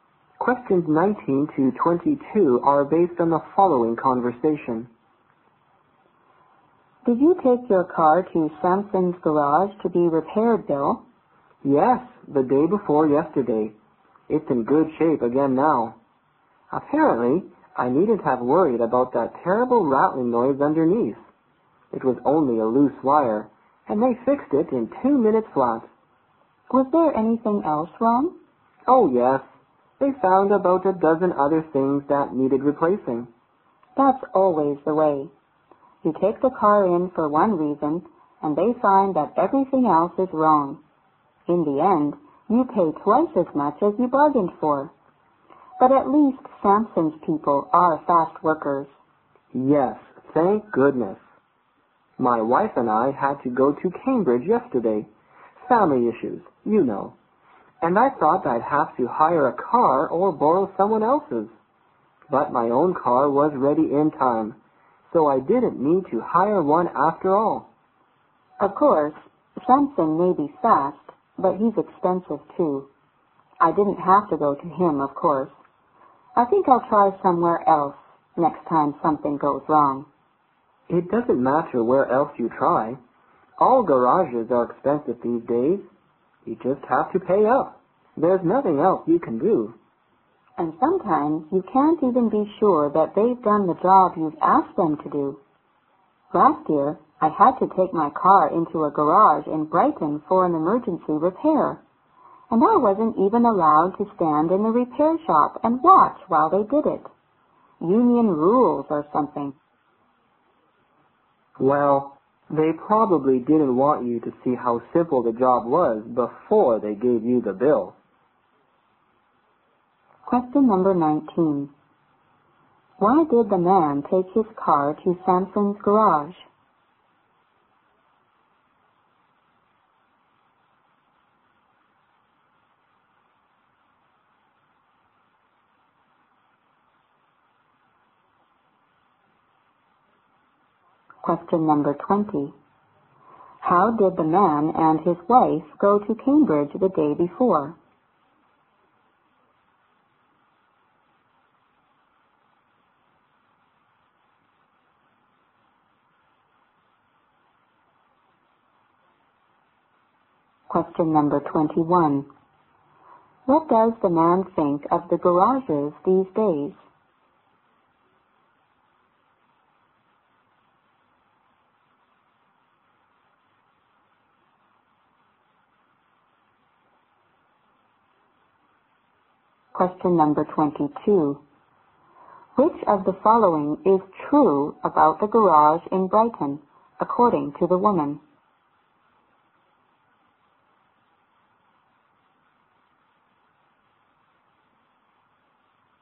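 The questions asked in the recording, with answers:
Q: Why did the man take his car to Samson's garage?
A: Because of a terrible rattling noise underneath

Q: How did the man and his wife go to Cambridge the day before?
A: In their own car, which was repaired in time

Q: Which of the following is true about the garage in Brighton, according to the woman?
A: She was not allowed to watch the repair in the shop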